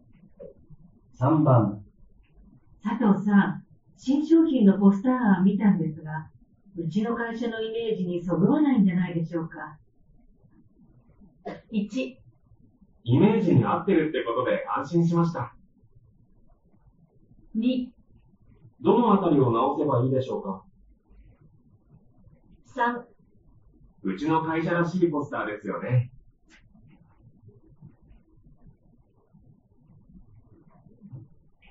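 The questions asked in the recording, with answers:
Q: 佐藤さん、新商品のポスター案見たんですが、うちの会社のイメージにそぐわないんじゃないでしょうか。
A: 2: どのあたりを直せばいいでしょうか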